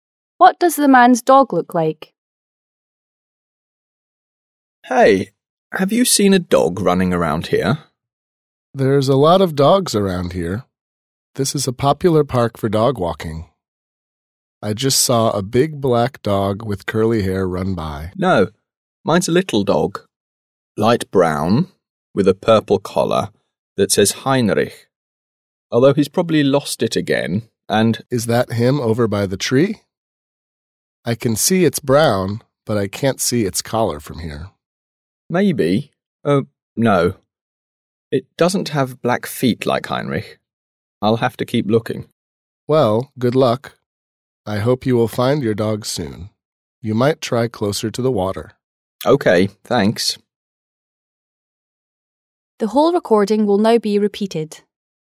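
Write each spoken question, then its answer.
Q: What does the man's dog look like?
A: A little light brown dog with black feet and a purple collar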